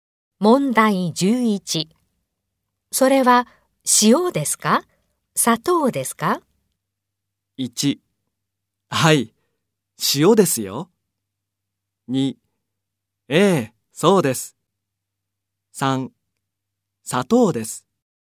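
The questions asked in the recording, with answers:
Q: それは塩ですか?砂糖ですか?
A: 3: 砂糖です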